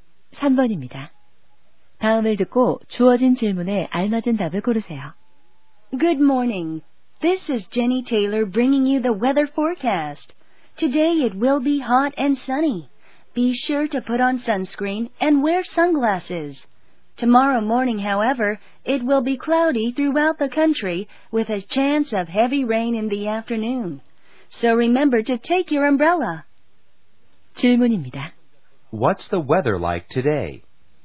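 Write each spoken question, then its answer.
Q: What's the weather like today?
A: Hot and sunny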